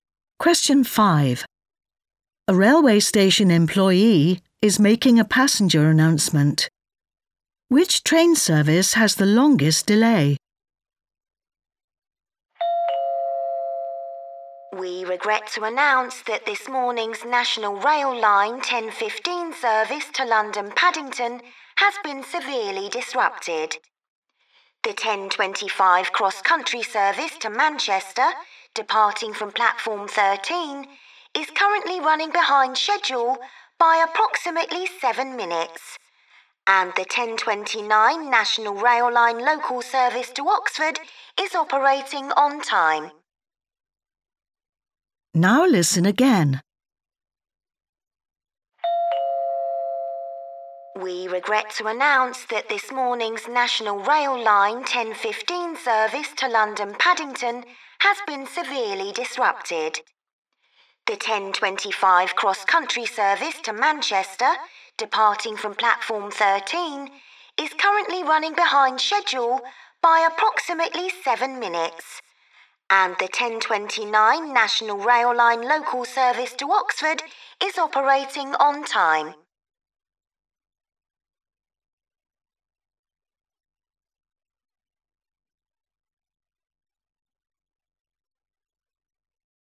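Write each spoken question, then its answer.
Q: Which train service has the longest delay?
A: the 10:15 service to London Paddington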